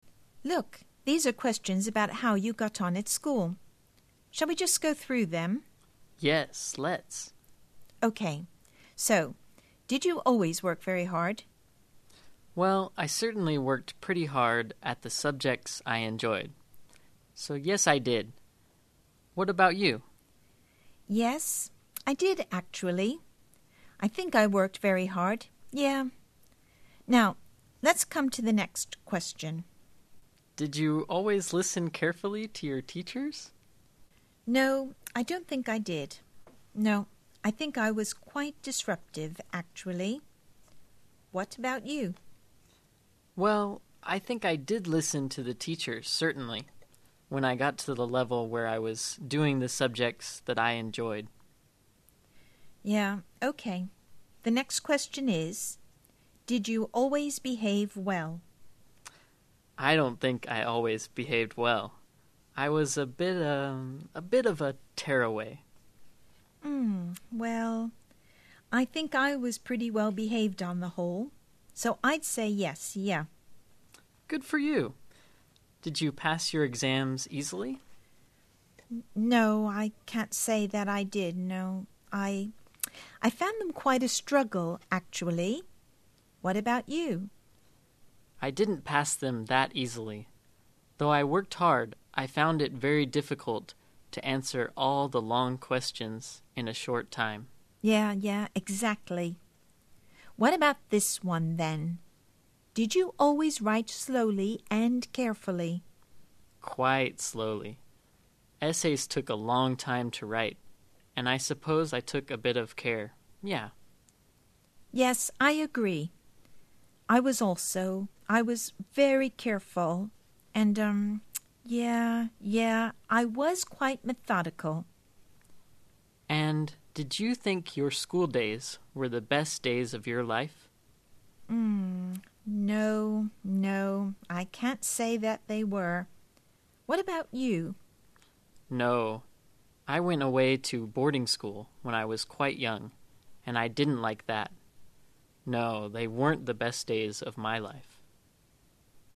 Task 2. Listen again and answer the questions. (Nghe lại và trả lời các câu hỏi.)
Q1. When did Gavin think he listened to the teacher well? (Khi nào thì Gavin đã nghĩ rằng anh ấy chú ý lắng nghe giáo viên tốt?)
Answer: When he enjoyed the subjects.

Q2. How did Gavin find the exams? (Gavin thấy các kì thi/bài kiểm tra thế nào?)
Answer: He found them very difficult.

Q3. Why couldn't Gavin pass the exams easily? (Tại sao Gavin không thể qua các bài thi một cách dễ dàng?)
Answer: Because the long questions were very hard for him to answer in a short time.

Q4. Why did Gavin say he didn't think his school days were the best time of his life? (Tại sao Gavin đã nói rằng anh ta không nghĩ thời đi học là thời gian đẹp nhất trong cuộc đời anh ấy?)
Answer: Because he went to a boarding school far away his home when he was quite young and he didn't like that. So, he found his schooldays were not the best days of his life.

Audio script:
Jenny: Look, these are questions about how you got on at school?
Gavin: Yes, let's.
Jenny: OK, so did you always work very hard?
Gavin: Well, I certainly worked pretty hard at the subjects I enjoyed. Yes, I did. What about you?
Jenny: Yes, I did actually. I think I worked very hard, yeah. Now let's come to the next question.
Gavin: Did, yeah, did you always listen carefully to your teachers?
Jenny: No, I don't think I did. No, I think I was quite disruptive, actually. What about you?
Gavin: Well, I think I did listen to the teachers certainly when I got to the level where I was doing the subjects that I enjoyed.
Jenny: Yeah, ok, the next question is, did you always behave well?
Gavin: I don't think I always behaved well. I was a bit, er, a bit of a tearaway.
Well, I think I was pretty well-behaved on the whole, so I 'd say yes, yeah.
Gavin: Good for you! Did you pass your exams easily?
Jenny: No, I can't say I did. No, I, I found them quite a struggle, actually. What about you?
Gavin: I didn't pass them that easily, though I worked hard I found it very difficult to answer all that lone questions in a short time.
Jenny: Yeah, yeah, exactly. What about this one, then? Did you always write slowly and carefully?
Gavin: Quite slowly. Essays took a long time to write and I suppose I took a bit of care, yes.
Jenny: Yes. I agree. I was also. I was very careful and erm, yeah, yeah I was quite methodical.
Gavin: And did you think your school days were the best days of your life?
Gavin: No, I went away to a boarding school when I was quite young and I didn't like that. No, they weren't the best days of my life.

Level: Lớp 12